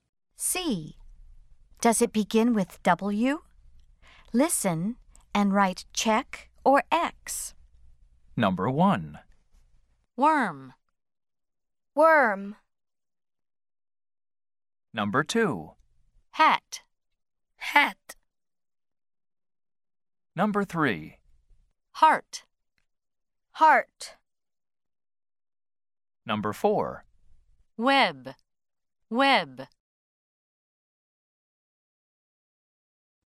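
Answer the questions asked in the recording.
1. Yes (check): worm
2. No (X): hat
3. No (X): heart
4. Yes (check): web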